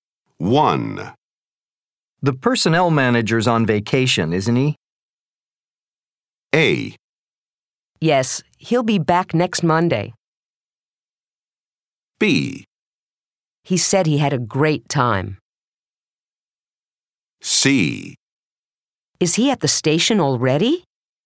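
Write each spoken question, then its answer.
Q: The personnel manager's on vacation, isn't he?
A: A: Yes, he'll be back next Monday.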